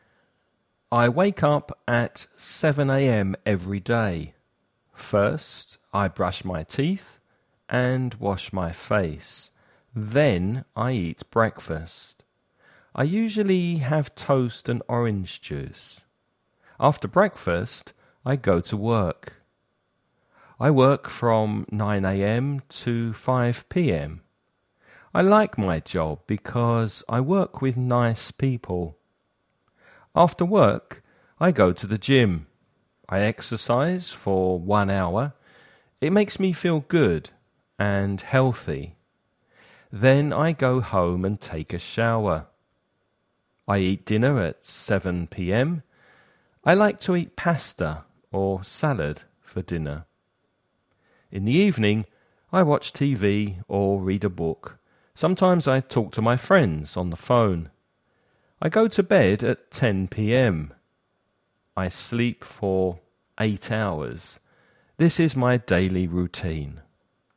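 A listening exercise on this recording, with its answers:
Escucha y contesta las siguientes preguntas.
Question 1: What time does the person wake up?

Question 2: What does the person eat for breakfast?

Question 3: What time does the person start work?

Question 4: What does the person do after work?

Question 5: What time does the person go to bed?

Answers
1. At 7 a.m.
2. Toast and orange juice
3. At 9 a.m.
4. Goes to the gym
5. At 10 p.m.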